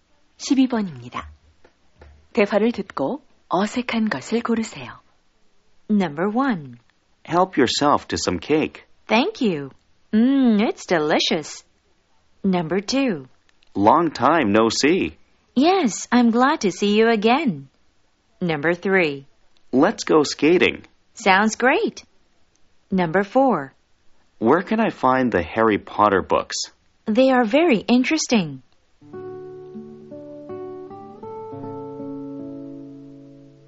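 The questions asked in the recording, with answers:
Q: 대화를 듣고 어색한 것을 고르세요.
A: 4: Where can I find the Harry Potter books? They are very interesting.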